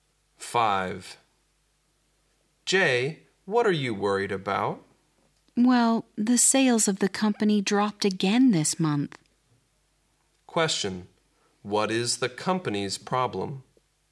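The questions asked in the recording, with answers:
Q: What is the company's problem?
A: Its sales dropped again this month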